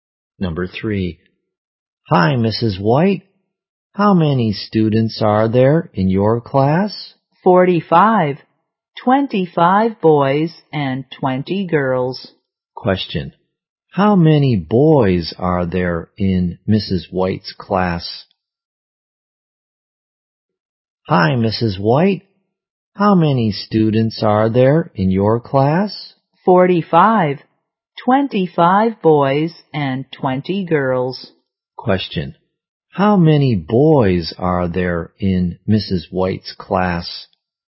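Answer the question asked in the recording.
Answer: 25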